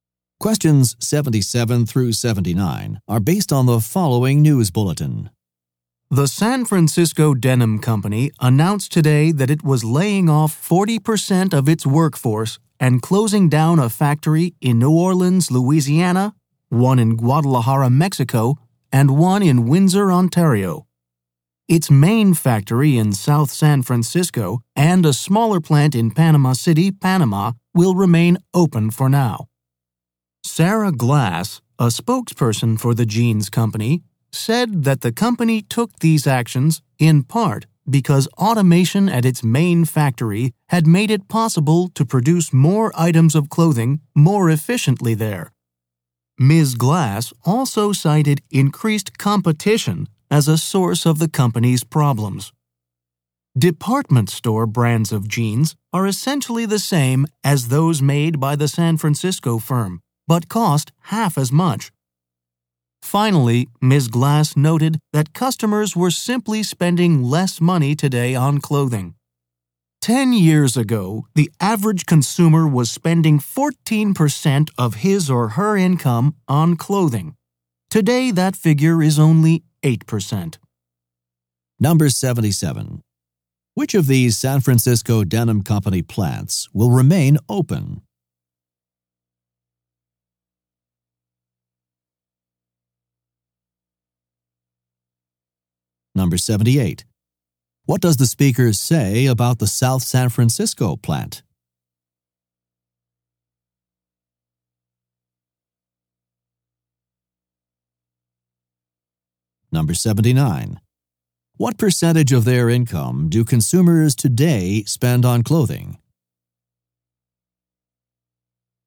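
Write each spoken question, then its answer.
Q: What does the speaker say about the South San Francisco plant?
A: Automation there has made production more efficient, and it will remain open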